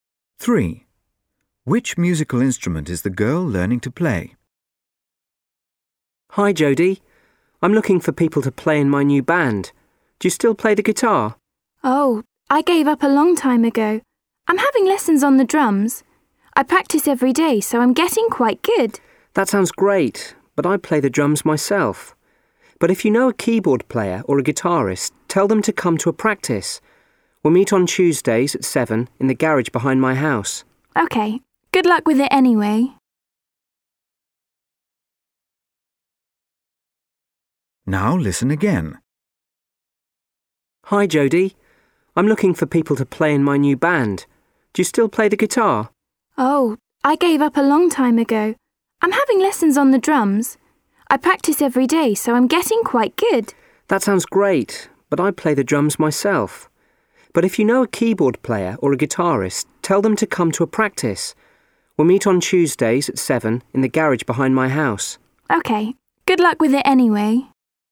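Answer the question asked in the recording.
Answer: The drums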